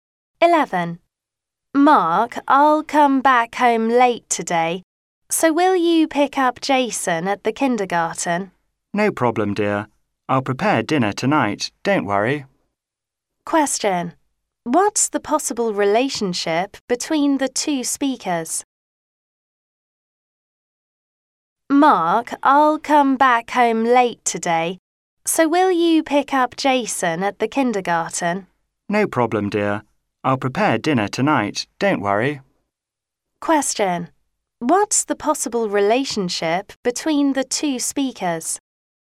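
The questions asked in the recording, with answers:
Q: Question: What's the possible relationship between the two speakers?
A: Husband and wife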